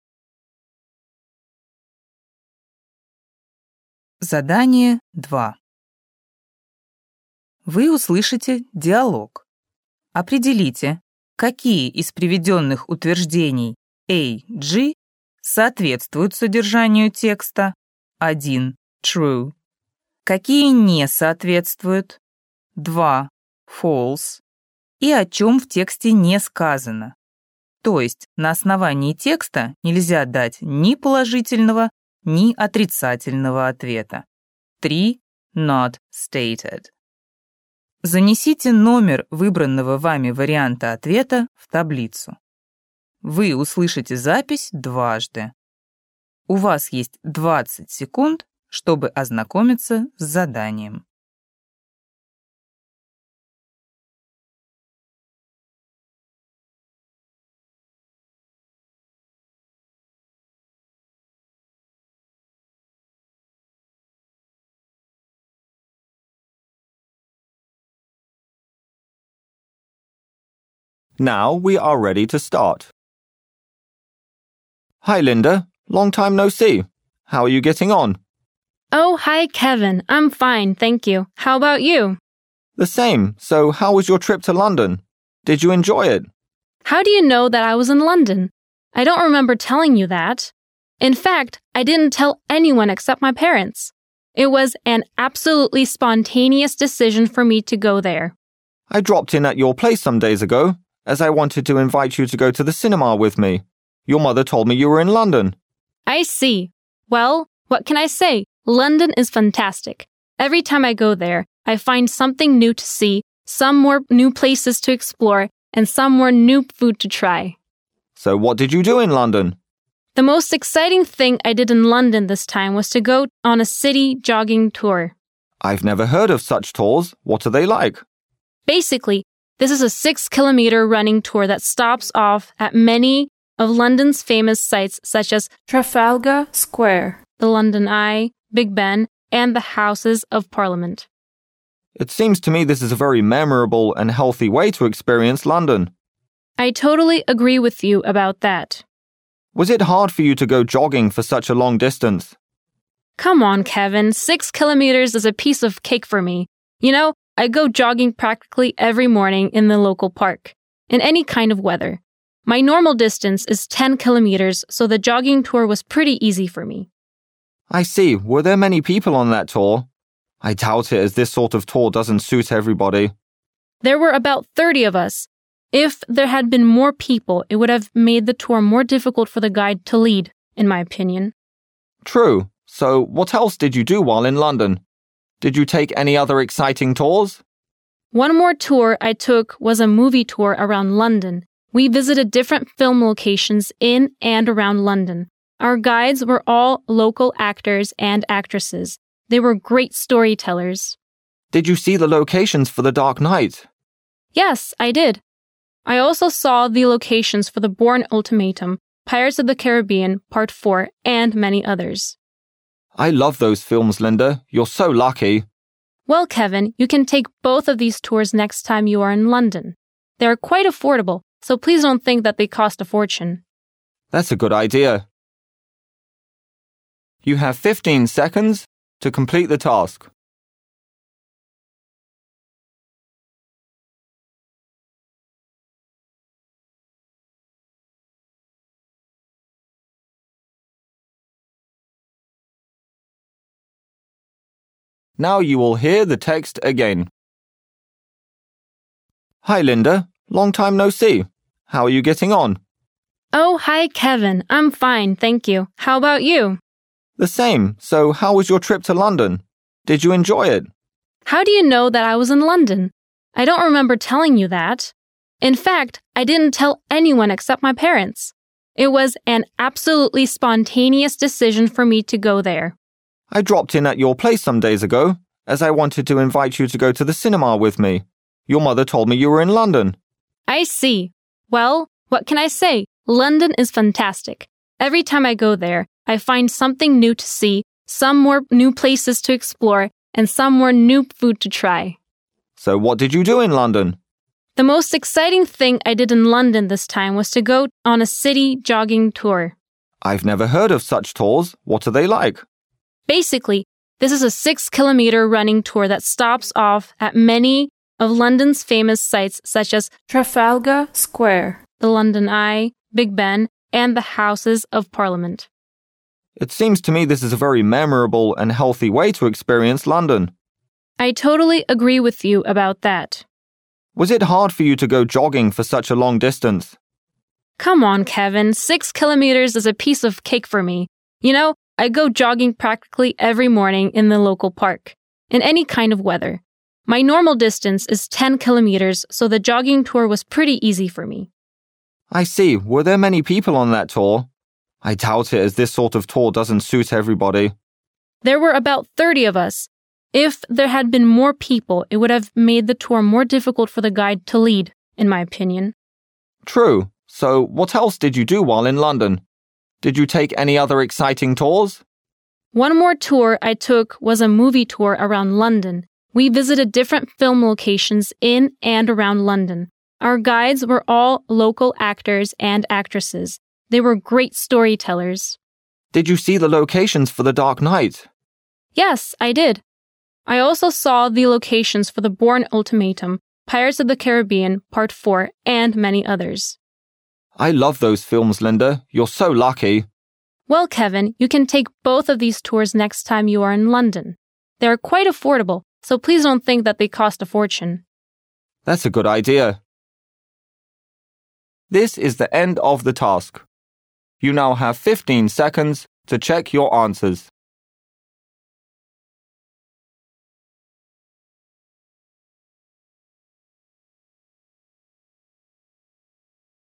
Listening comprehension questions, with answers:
Вы услышите диалог. Определите, какие из приведённых утверждений А-G соответствуют содержанию текста (1 - True), какие не соответствуют (2 - False) и о чём в тексте не сказано, то есть на основании текста нельзя дать ни положительного, ни отрицательного ответа (3 - Not stated). Запишите ответ последовательностью из 7 цифр. Вы услышите запись дважды.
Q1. It was Linda's first visit to London.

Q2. Big Ben is Linda's favourite place in London.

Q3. Linda found the jogging tour exhausting.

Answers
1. False
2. Not stated
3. False

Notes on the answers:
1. Linda: Every time I go there, I find something new to see
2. Linda: Basically, this is a six-kilometer running tour that stops off at many of London's famous sites such as Trafalgar Square, the London Eye, Big Ben, and the houses of Parliament. (she mentioned Big Ben as a part of the jogging tour, but we don't know if it's her favourite place or not)
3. Linda: Six kilometers is a piece of cake for me (= very easy).